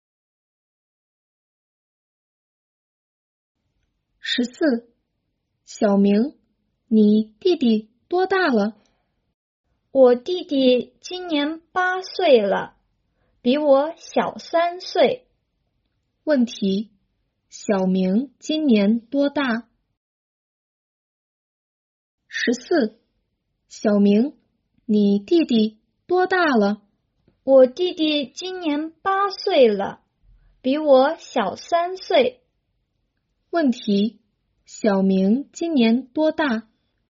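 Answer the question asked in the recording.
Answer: 十一岁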